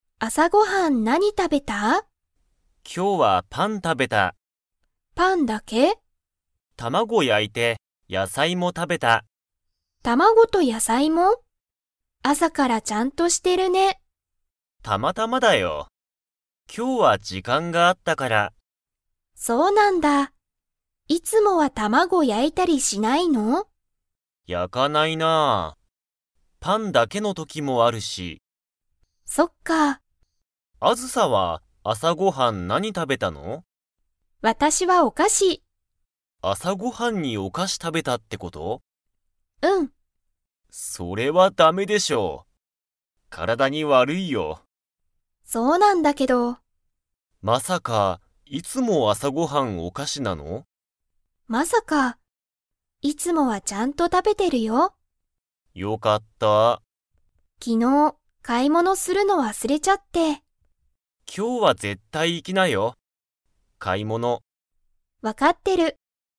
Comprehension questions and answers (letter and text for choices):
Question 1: あずさは、朝あさごはんに何なにを食たべましたか?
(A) パン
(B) 卵たまご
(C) 野菜やさい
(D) お菓子かし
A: (D) お菓子かし

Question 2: あずさは、昨日きのう買かい物ものするのを 。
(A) 忘わすれた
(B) 忘わすれてない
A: (A) 忘わすれた

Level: Level 4